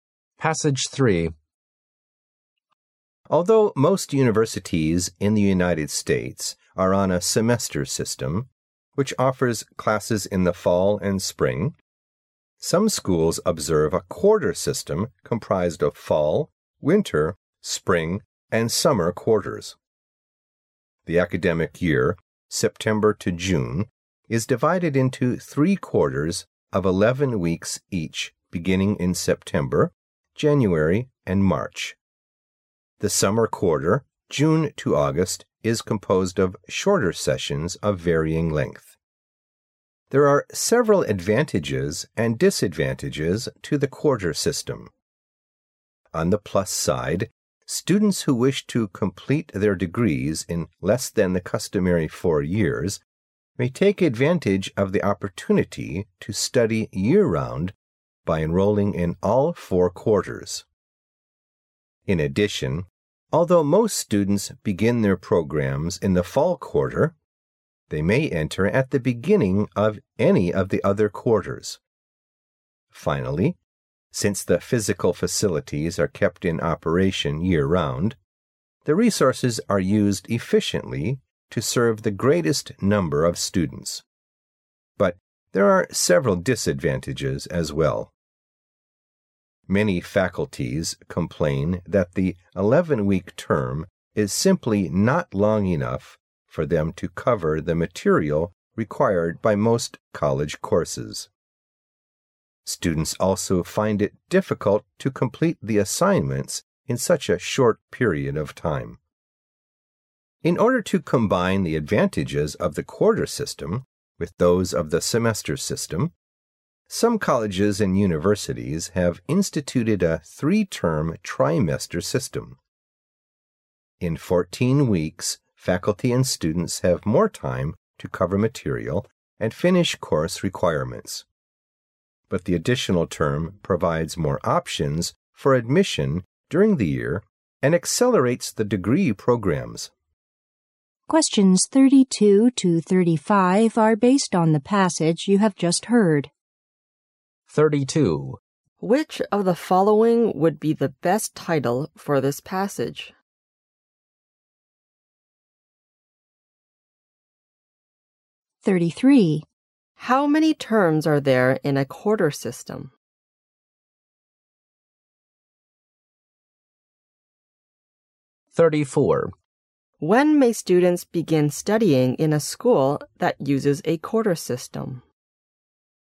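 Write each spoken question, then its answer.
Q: How many terms are there in a quarter system?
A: Four

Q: When may students begin studying in a school that uses a quarter system?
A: At the beginning of any quarter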